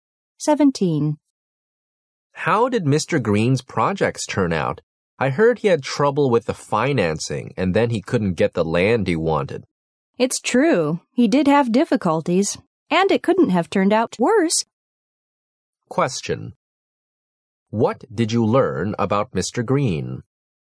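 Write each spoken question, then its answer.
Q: What did you learn about Mr.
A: His project turned out very badly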